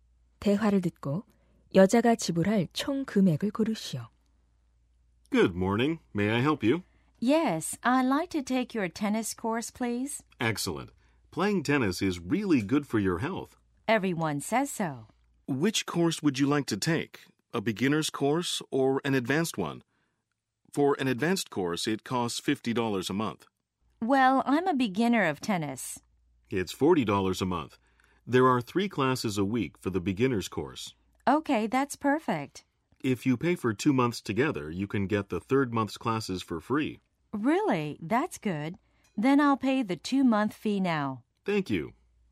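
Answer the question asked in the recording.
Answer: $80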